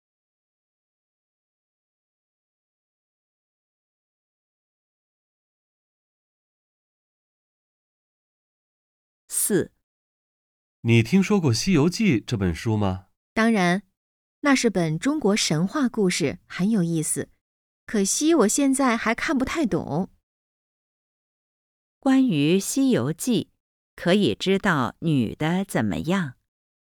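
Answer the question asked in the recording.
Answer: 她现在还看不太懂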